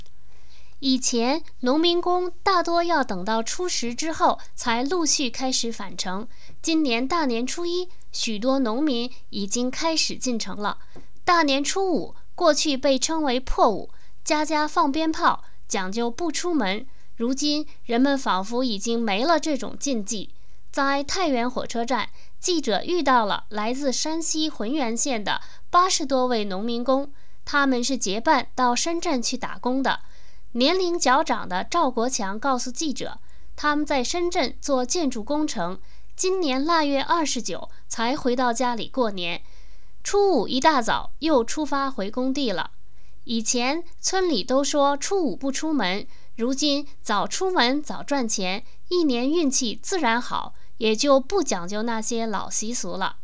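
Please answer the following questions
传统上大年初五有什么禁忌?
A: 不出门

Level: 3rd Year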